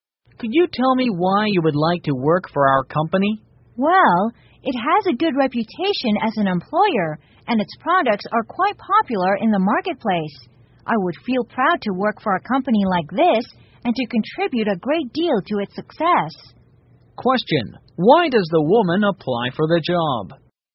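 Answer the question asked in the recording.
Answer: The company has a good reputation as an employer and popular products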